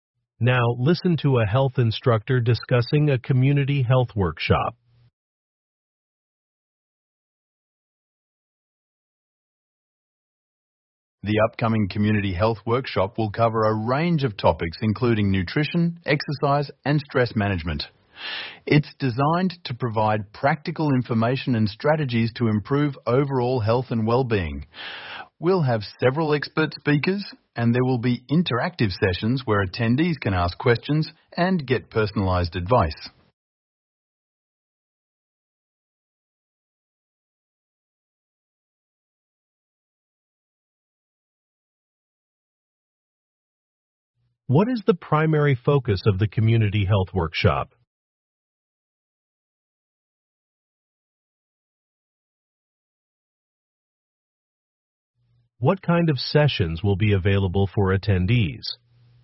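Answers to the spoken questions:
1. Improving overall health and well-being (nutrition, exercise, stress management)
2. Interactive sessions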